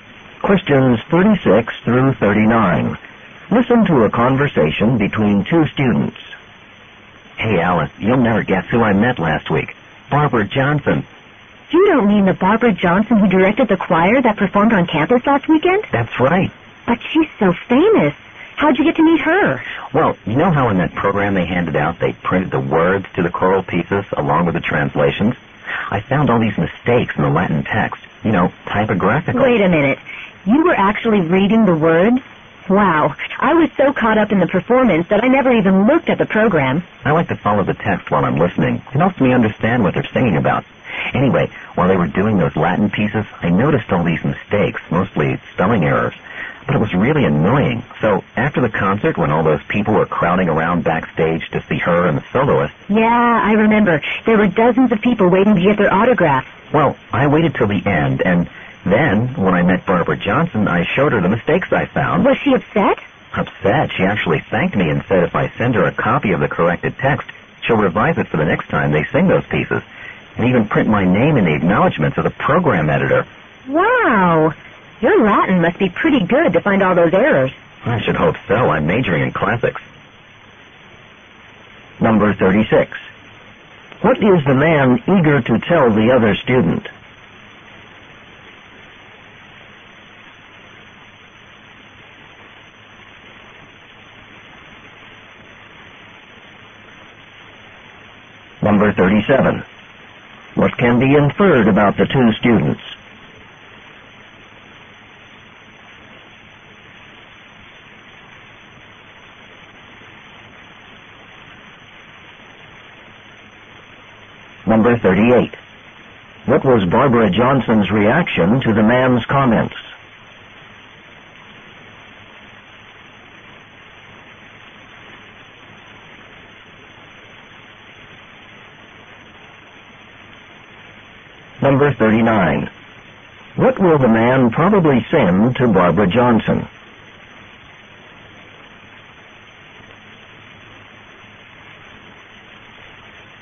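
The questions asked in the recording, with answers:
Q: What is the man eager to tell the other student?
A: That he met Barbara Johnson

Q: What was Barbara Johnson's reaction to the man's comments?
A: She thanked him

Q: What will the man probably send to Barbara Johnson?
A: A corrected copy of the Latin text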